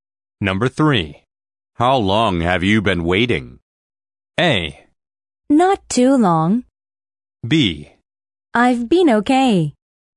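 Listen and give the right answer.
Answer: A: Not too long.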